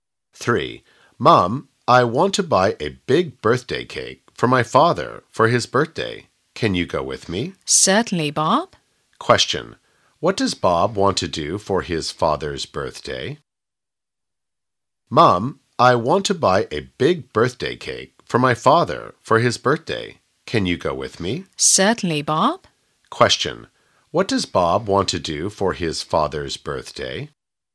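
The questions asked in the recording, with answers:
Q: What does Bob want to do for his father's birthday?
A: Buy a big birthday cake for him.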